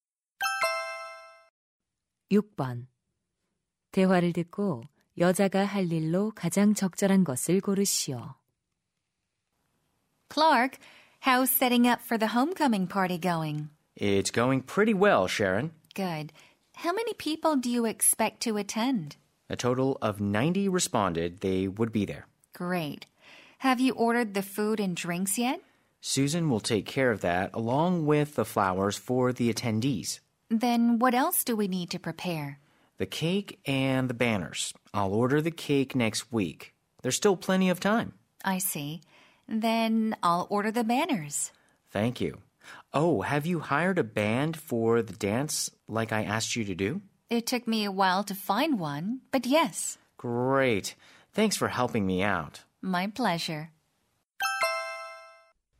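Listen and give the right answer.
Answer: 현수막 주문하기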